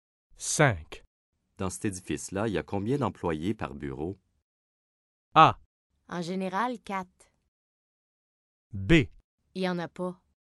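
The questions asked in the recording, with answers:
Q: Dans cet édifice-là, il y a combien d'employés par bureau?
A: A: En général, 4.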